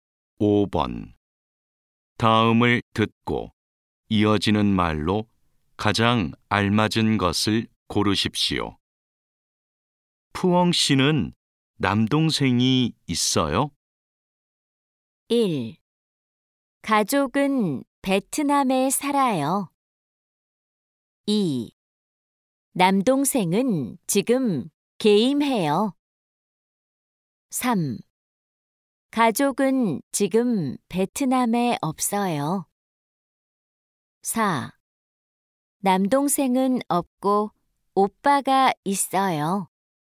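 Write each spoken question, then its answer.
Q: 푸엉 씨는 남동생이 있어요?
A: 4: 남동생은 없고 오빠가 있어요.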